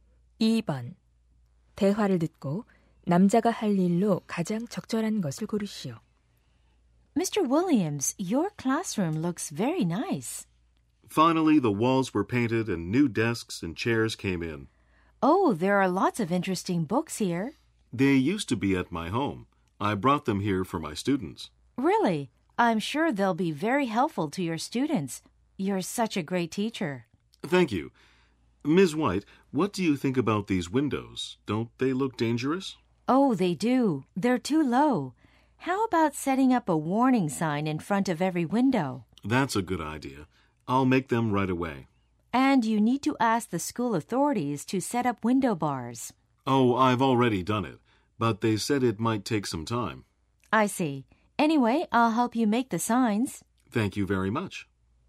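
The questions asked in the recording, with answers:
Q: 대화를 듣고 남자가 할 일로 가장 적절한 것을 고르시오.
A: 경고 표지판 만들기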